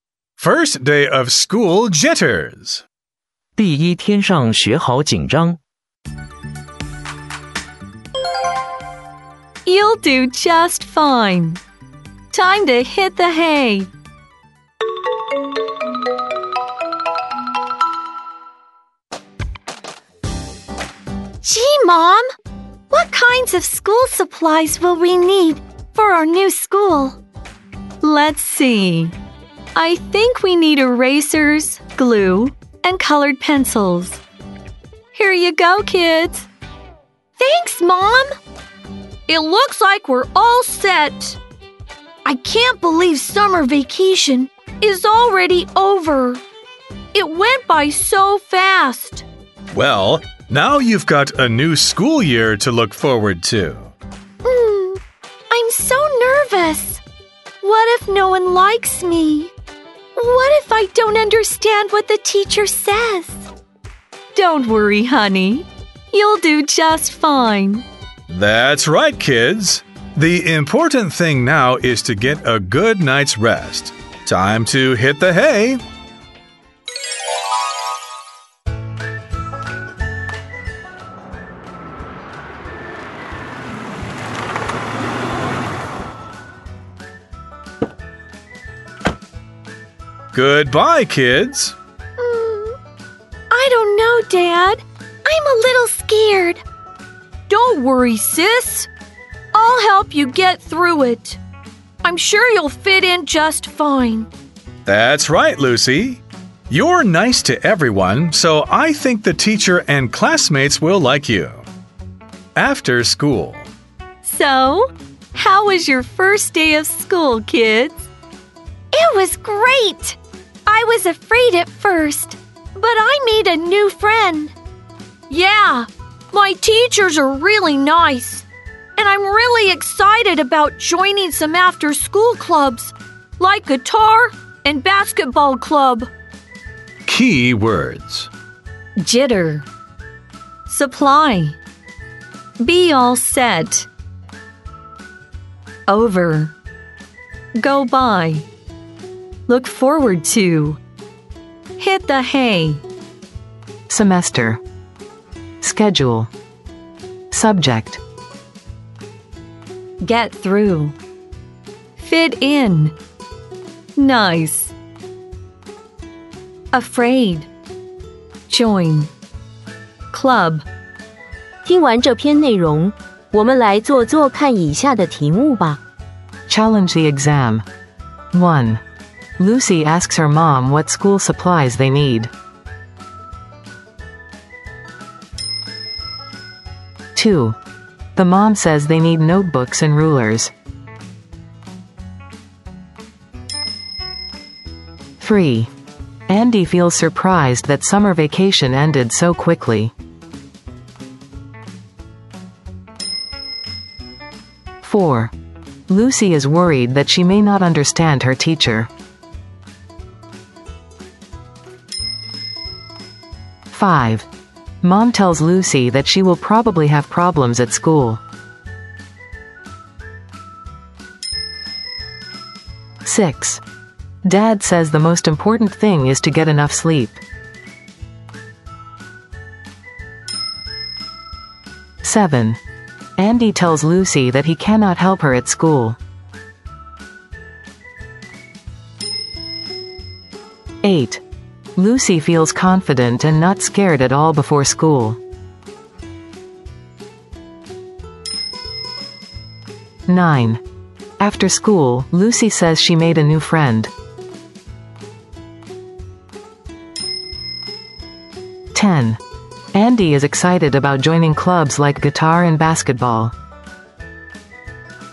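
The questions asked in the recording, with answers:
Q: The mom says they need notebooks and rulers.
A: False

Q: Mom tells Lucy that she will probably have problems at school.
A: False

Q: Dad says the most important thing is to get enough sleep.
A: True

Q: Andy tells Lucy that he cannot help her at school.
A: False

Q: Lucy feels confident and not scared at all before school.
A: False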